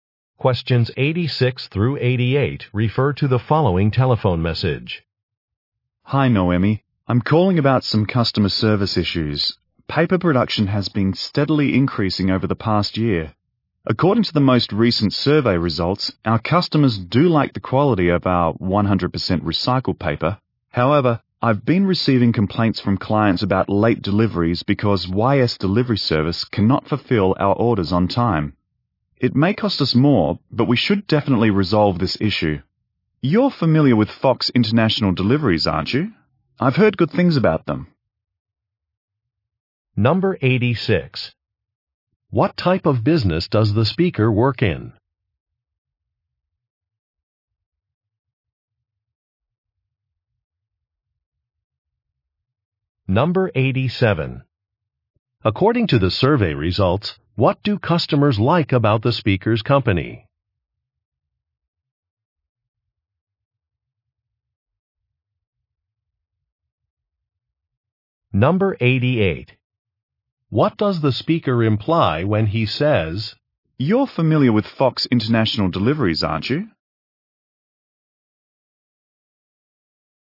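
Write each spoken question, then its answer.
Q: What type of business does the speaker work in?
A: Paper production

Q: According to the survey results, what do customers like about the speaker's company?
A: The quality of its recycled paper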